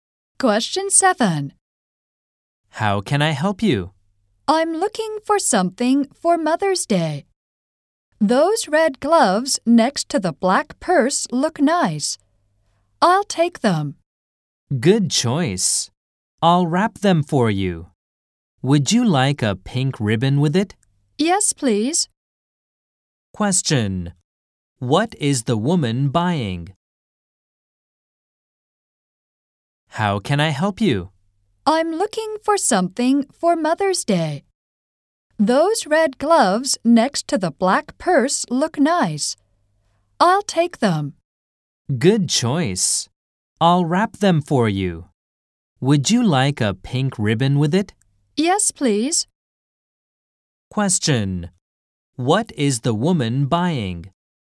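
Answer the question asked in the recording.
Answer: Red gloves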